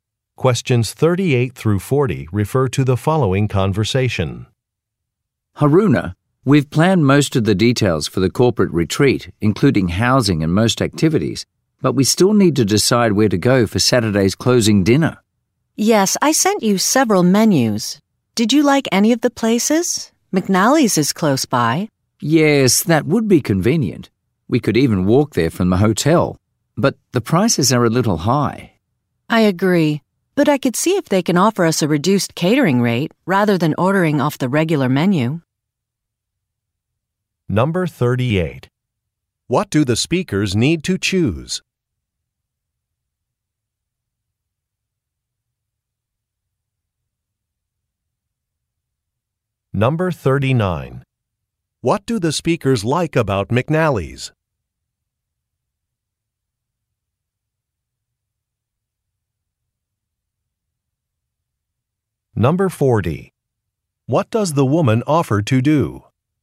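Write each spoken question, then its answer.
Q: What do the speakers need to choose?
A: A restaurant for the closing dinner

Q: What do the speakers like about McNally's?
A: It is close by (walkable from the hotel)

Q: What does the woman offer to do?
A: Ask for a reduced catering rate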